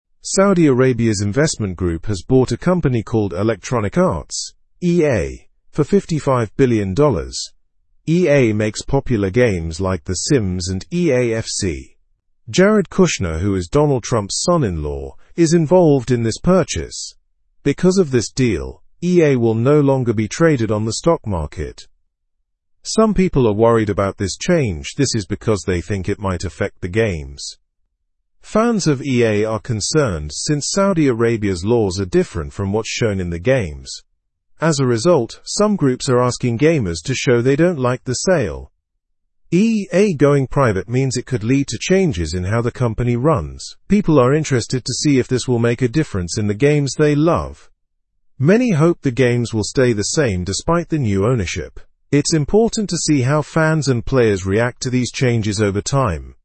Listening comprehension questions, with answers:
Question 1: What did Saudi Arabia's investment group buy?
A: Electronic Arts (EA).

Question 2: How much did they pay for Electronic Arts?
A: $55 billion.

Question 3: Who is involved from Donald Trump's family?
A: Jared Kushner.

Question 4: What happened to EA on the stock market after the sale?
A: It is no longer traded there.

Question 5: Why are fans worried about this sale?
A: Because Saudi Arabia's laws don't match EA's games.

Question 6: What are groups asking gamers to do in response to the sale?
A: To protest the sale.

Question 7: What do people hope will stay the same after the new ownership?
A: The games will remain unchanged.

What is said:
Saudi Arabia's investment group has bought a company called Electronic Arts (EA) for $55 billion. EA makes popular games like The Sims and EA FC. Jared Kushner, who is Donald Trump's son-in-law, is involved in this purchase. Because of this deal, EA will no longer be traded on the stock market.
Some people are worried about this change. This is because they think it might affect the games. Fans of EA are concerned since Saudi Arabia's laws are different from what's shown in the games. As a result, some groups are asking gamers to show they don't like the sale.
EA going private means it could lead to changes in how the company runs. People are interested to see if this will make a difference in the games they love. Many hope the games will stay the same despite the new ownership. It's important to see how fans and players react to these changes over time.

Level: Level 2